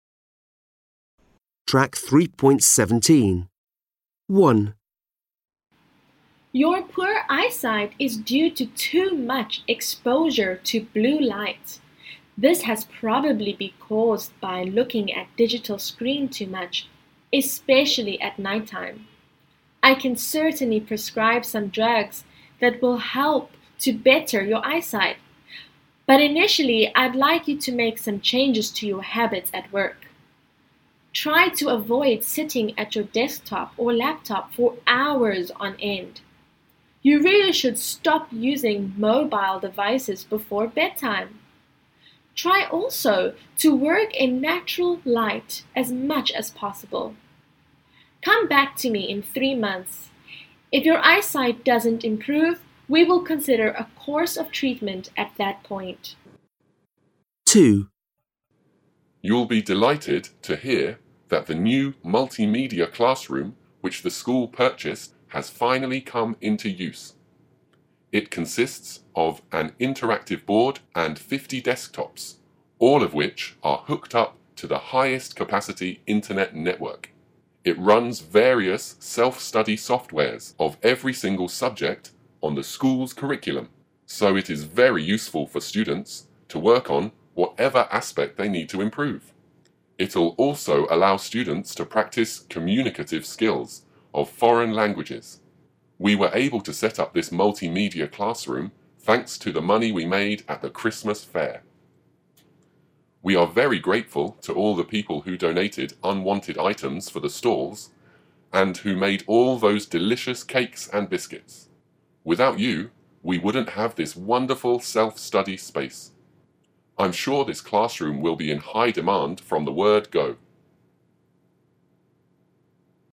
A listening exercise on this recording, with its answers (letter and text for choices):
Listen to a doctor and a headteacher, and circle the TWO correct options for each person.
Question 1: Mục đích của bác sĩ là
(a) khuyến khích bệnh nhân có một môi trường làm việc và thói quen khoẻ mạnh.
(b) cảnh báo bệnh nhân về nguy hiểm của việc sử dụng thiết bị điện tử trước khi đi ngủ.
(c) gợi ý liệu trình điều trị.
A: (a) khuyến khích bệnh nhân có một môi trường làm việc và thói quen khoẻ mạnh.

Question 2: Mục đích của hiệu trưởng là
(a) thuyết phục học sinh sử dụng phòng học đa phương tiện.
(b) thông báo đến mọi người về phòng học đa phương tiện mới.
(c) cảm ơn mọi người đã giúp đỡ trường học để gây quỹ.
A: (c) cảm ơn mọi người đã giúp đỡ trường học để gây quỹ.

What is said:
1. Your blurred eyesight is due to too much exposure to blue lights. This has probably because by looking at digital screen too much, especially at night time. I can certainly prescribe some drugs that will help to better your eyesight. But initially I'd like you to make some changes to your habits at work. Try to avoid sitting at your desktop or laptop for hours on end. You should stop using mobile devices before bedtime. Try also to work in natural light as much as possible. Come back to me in 3 months, if your eye sight doesn't improve we will consider a course of treatment at that point.
2. You will be delighted to hear that the new multimedia classroom which the school purchased has finally come into use. It consists of an interactive board and 50 desktops all of which are hooked up to the highest capacity internet network. It runs various self study software of every single subject on the school's curriculum, so it is very useful for students to work on whatever aspect they need to improve. It'll also allow students to practice communicative skills of foreign languages we were able to set up this multi media classroom thanks to the money we made after Christmas back. We are very grateful to all the people who donated unwanted items for the schools and who made all those delicious cakes and biscuits, without you we wouldn't have this wonderful self study space. I'm sure this classroom will be in high demand from the word go.

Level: Lớp 10